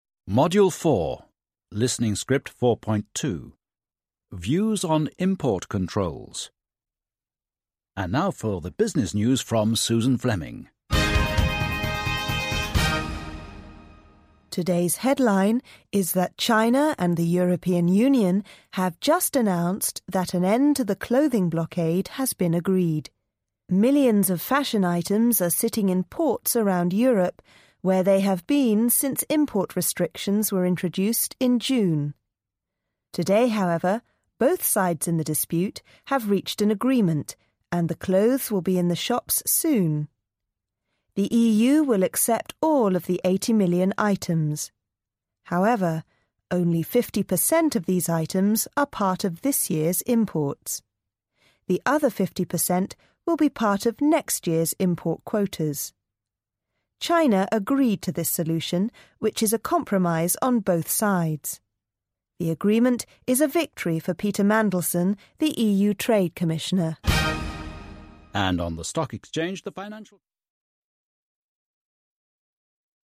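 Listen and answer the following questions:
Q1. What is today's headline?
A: China and the EU have announced that an end to the clothing blockade has been agreed.

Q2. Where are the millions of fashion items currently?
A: In ports around Europe.

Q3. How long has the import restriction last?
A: Since June.

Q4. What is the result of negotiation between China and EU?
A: They reached an agreement: the EU will accept all 80 million items, and the clothes will soon be in the shops.

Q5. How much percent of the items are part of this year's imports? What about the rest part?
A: 50%; the other 50% will be part of next year's import quotas.

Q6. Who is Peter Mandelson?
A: The EU Trade Commissioner.

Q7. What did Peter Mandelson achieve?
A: A victory: the agreement with China.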